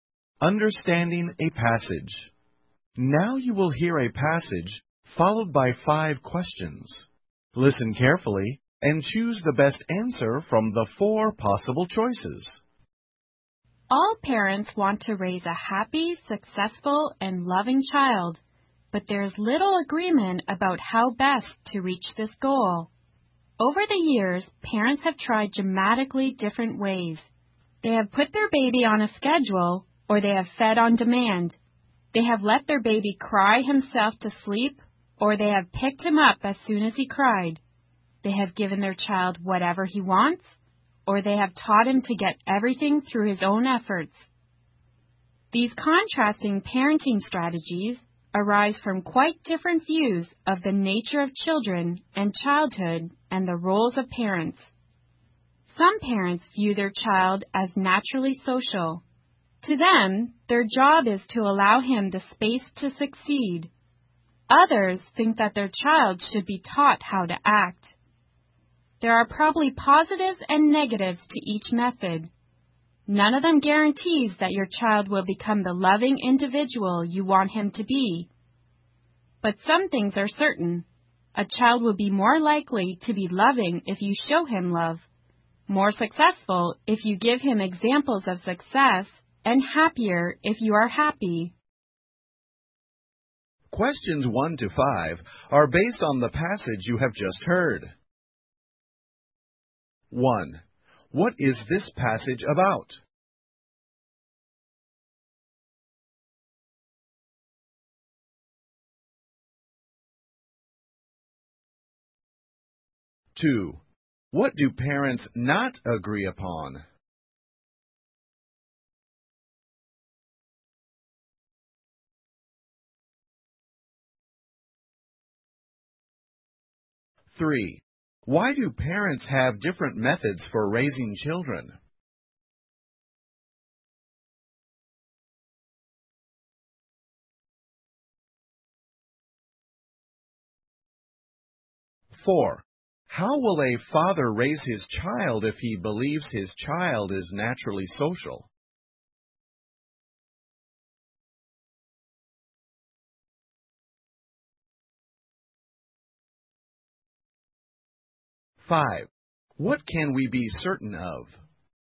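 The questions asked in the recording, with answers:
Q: What is this passage about?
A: Different ways of raising children

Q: What do parents not agree upon?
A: How best to raise a happy, successful and loving child

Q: Why do parents have different methods for raising children?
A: They have different views of the nature of children and childhood and of the roles of parents

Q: How will a father raise his child if he believes his child is naturally social?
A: He will give the child the space to succeed

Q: What can we be certain of?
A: A child will be more likely to be loving if shown love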